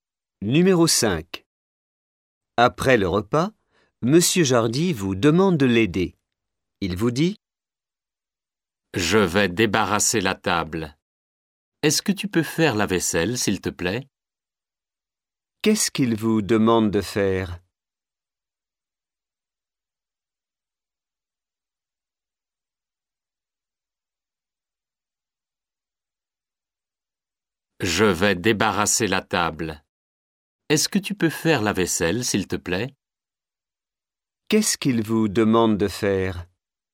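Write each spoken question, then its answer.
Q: Qu'est-ce qu'il vous demande de faire ?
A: Faire la vaisselle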